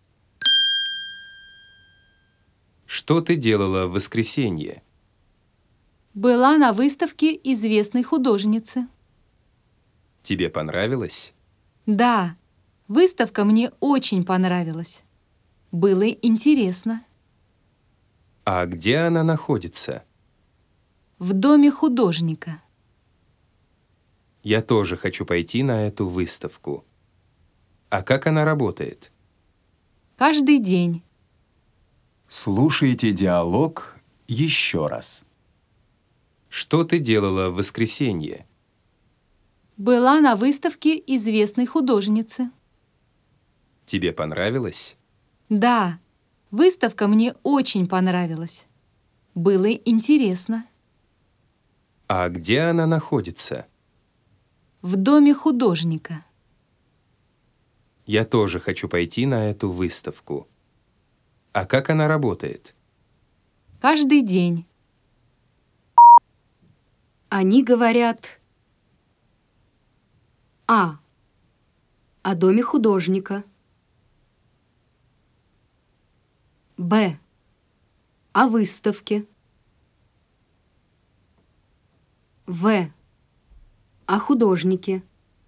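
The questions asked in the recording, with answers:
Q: Они говорят.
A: Б: О выставке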